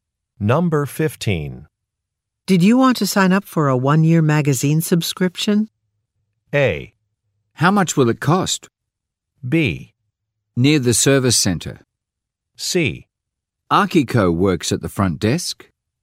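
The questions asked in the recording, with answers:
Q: Did you want to sign up for a 1-year magazine subscription?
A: A: How much will it cost?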